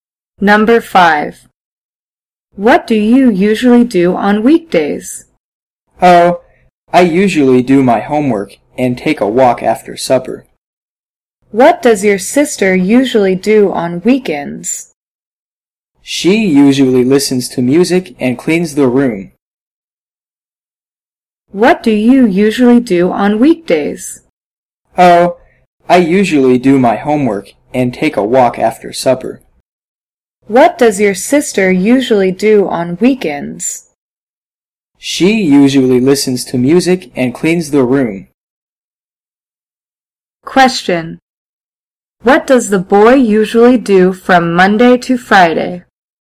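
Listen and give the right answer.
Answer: He does his homework and takes a walk after supper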